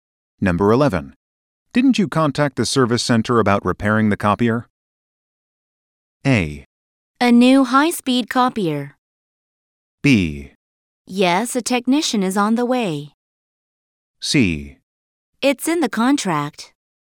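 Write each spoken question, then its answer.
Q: Didn't you contact the service center about repairing the copier?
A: B: Yes, a technician is on the way.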